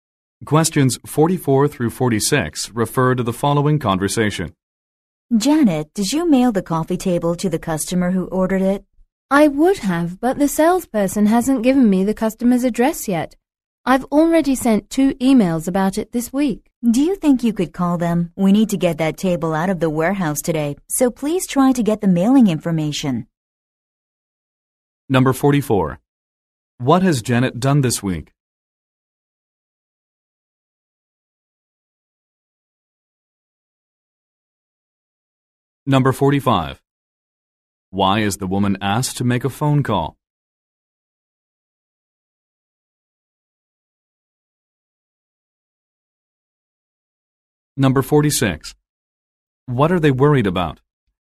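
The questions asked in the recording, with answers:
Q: What has Janet done this week?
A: Sent 2 emails about the customer's address

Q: Why is the woman asked to make a phone call?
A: To get the customer's mailing information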